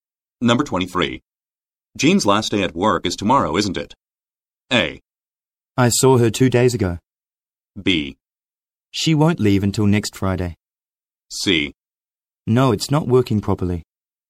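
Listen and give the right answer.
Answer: B: She won't leave until next Friday.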